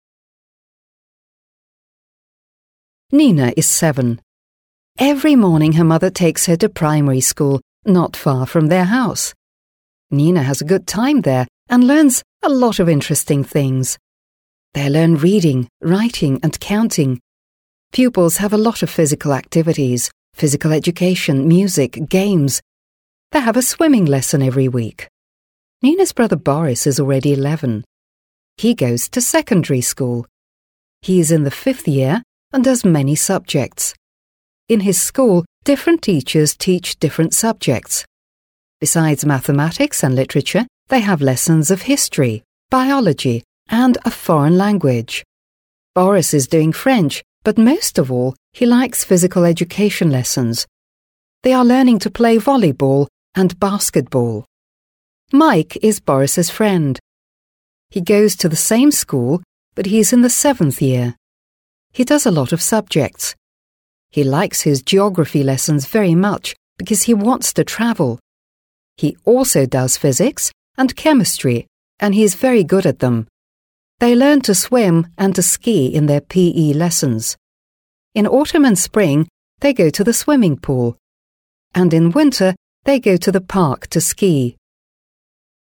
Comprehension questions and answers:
Listen and say which sentences are true.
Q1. She is seven.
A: True

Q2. Her father always drives her to school.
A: False

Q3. Nina hates her school.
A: False

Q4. Sport is very important in Nina's school.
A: True

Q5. He goes to primary school.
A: False

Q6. He is a year five pupil.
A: True

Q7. He has just one teacher.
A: False

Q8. He likes French most of all.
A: False

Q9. He is younger than Boris.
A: False

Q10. He does a few subjects.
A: False

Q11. He enjoys physics and chemistry.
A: True

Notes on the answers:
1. Из текста мы узнаем, что Нине семь лет, это подтверждает правильность ответа.
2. В тексте говорится, что Нину каждый день в школу отвозит мама, а не папа.
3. В тексте не упоминается, что Нина ненавидит свою школу. Наоборот, она хорошо проводит время и узнает много нового.
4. В тексте упоминается, что Нина занимается физической активностью: плаванием, физкультурой и другими активностями, что подтверждает важность спорта в её школе.
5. Борис учится в средней школе, как указано в тексте.
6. Борис учится в 5 классе, это прямо указано в тексте.
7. В тексте говорится, что в школе Бориса разные учителя преподают разные предметы, а значит, у него несколько учителей.
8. В тексте указано, что Борис изучает французский язык, но это не его любимый предмет. Он больше всего интересуется физкультурой.
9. Борису 11 лет (5 класс), а Майк учится в 7 классе, следовательно, Майк старше Бориса.
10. В тексте сказано, что Майк изучает много предметов, а не «несколько».
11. В тексте говорится, что Майк изучает физику и химию, и у него это хорошо получается.

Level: 7 класс